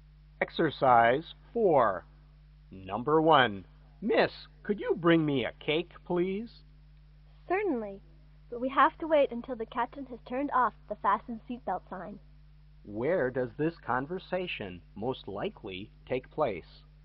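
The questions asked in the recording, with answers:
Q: Where does this conversation most likely take place?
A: On a plane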